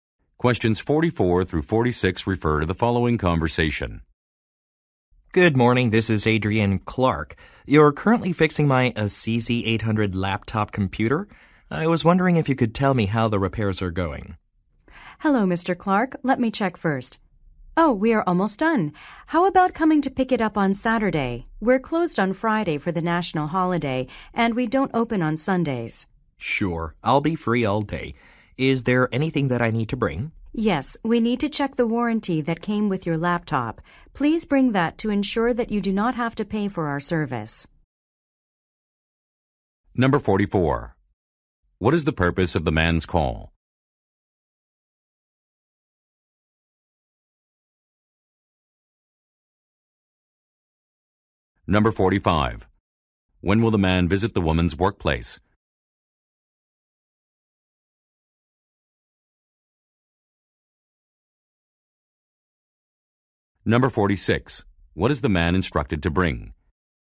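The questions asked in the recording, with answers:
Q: What is the purpose of the man's call?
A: To check on his laptop repairs

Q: When will the man visit the woman's workplace?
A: On Saturday

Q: What is the man instructed to bring?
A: The laptop's warranty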